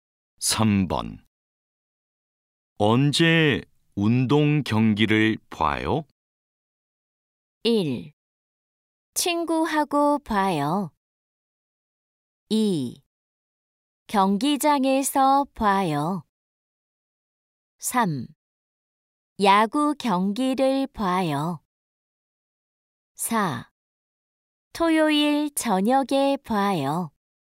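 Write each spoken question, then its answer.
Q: 언제 운동 경기를 봐요?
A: 4: 토요일 저녁에 봐요.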